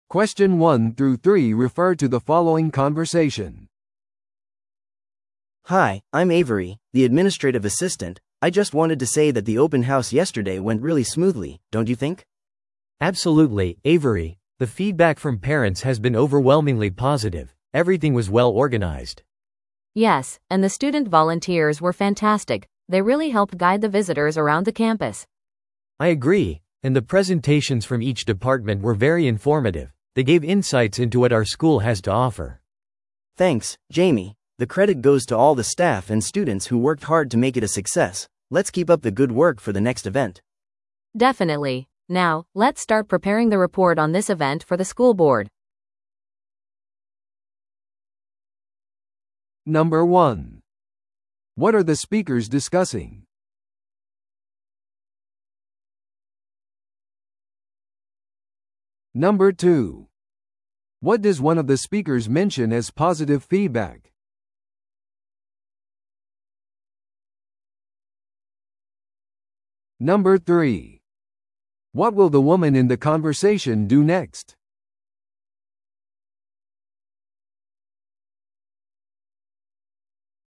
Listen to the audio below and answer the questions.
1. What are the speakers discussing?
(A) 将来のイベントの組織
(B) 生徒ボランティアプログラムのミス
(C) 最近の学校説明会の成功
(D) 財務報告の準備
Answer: (C) 最近の学校説明会の成功

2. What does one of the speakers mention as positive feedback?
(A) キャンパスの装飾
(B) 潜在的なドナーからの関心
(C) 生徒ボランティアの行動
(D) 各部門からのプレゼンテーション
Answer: (D) 各部門からのプレゼンテーション

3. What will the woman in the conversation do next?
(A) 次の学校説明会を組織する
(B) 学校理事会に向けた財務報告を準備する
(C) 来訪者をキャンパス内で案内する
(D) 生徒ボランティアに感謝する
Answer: (B) 学校理事会に向けた財務報告を準備する

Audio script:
A: Hi, I'm Avery, the administrative assistant. I just wanted to say that the open house yesterday went really smoothly, don't you think?
B: Absolutely, Avery. The feedback from parents has been overwhelmingly positive. Everything was well organized.
C: Yes, and the student volunteers were fantastic! They really helped guide the visitors around the campus.
B: I agree! And the presentations from each department were very informative. They gave insights into what our school has to offer.
A: Thanks, Jamie! The credit goes to all the staff and students who worked hard to make it a success. Let's keep up the good work for the next event!
C: Definitely. Now, let's start preparing the report on this event for the school board.

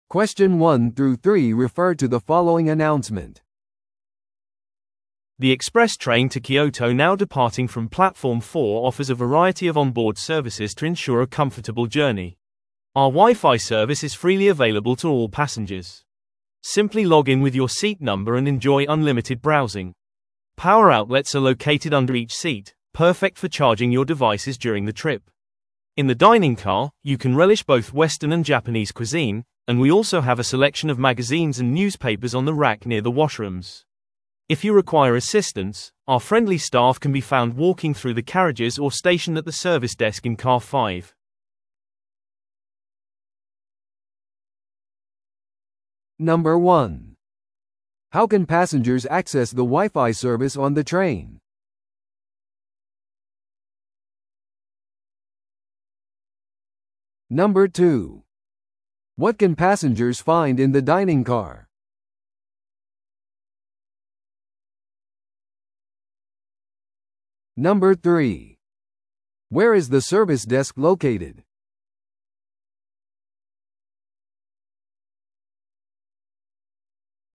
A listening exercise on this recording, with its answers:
Listen to the audio below and answer the questions.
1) How can passengers access the WiFi service on the train?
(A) Wi-Fiパスを購入して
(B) スタッフにアクセスを依頼して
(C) 近くのホットスポットに接続して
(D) 座席番号でログインして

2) What can passengers find in the dining car?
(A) お土産屋さん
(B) 洋食と和食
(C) 映画館セクション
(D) ペットフレンドリーエリア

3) Where is the service desk located?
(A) 5号車内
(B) 電車の入口付近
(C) 食堂車内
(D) 運転士の区画に隣接して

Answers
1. (D) 座席番号でログインして
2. (B) 洋食と和食
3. (A) 5号車内

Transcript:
The express train to Kyoto now departing from platform 4 offers a variety of onboard services to ensure a comfortable journey. Our WiFi service is freely available to all passengers. Simply log in with your seat number and enjoy unlimited browsing. Power outlets are located under each seat, perfect for charging your devices during the trip. In the dining car, you can relish both western and Japanese cuisine, and we also have a selection of magazines and newspapers on the rack near the washrooms. If you require assistance, our friendly staff can be found walking through the carriages or stationed at the service desk in car 5.

